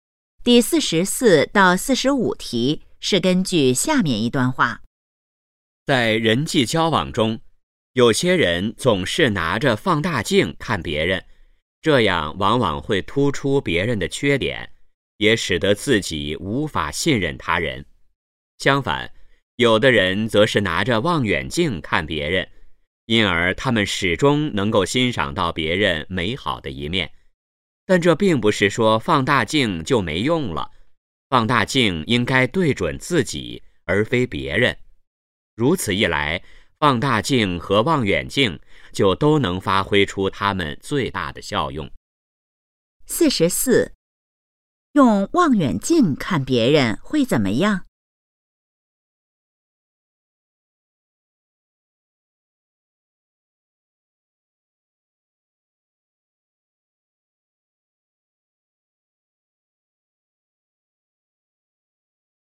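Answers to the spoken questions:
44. 能欣赏到别人美好的一面
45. 用放大镜看自己,用望远镜看别人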